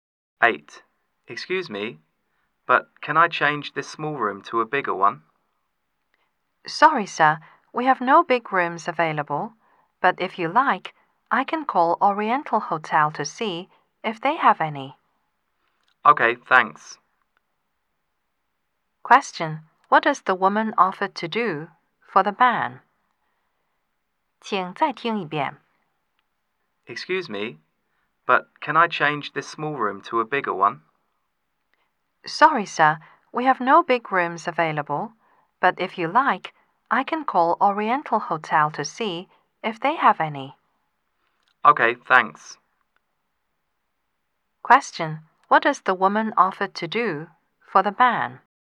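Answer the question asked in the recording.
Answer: Call Oriental Hotel to see if they have a bigger room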